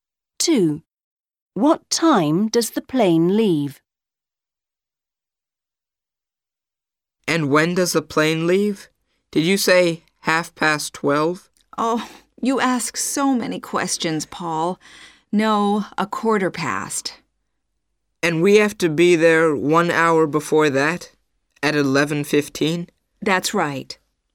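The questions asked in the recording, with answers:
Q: What time does the plane leave?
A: 12:15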